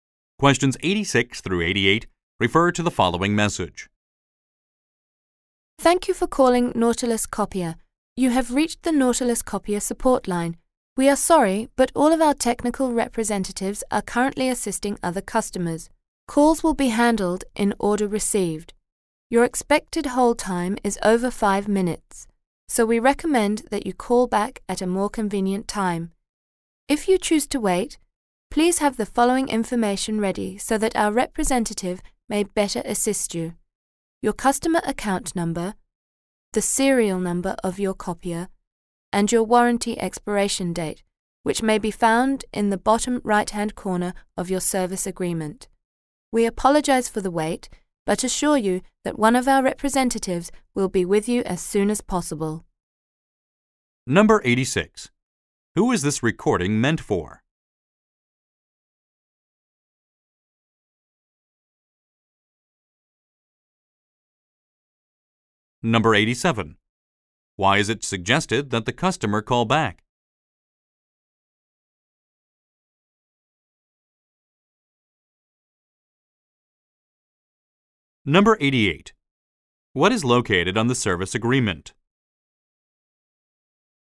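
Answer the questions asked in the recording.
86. Customers calling the Nautilus Copier support line
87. The hold time is over 5 minutes
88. The warranty expiration date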